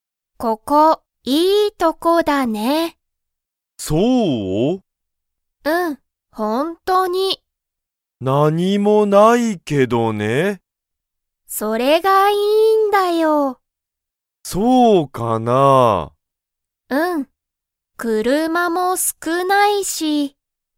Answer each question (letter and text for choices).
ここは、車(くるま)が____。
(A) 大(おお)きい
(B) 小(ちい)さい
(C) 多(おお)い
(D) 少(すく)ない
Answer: (D) 少(すく)ない

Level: Level 1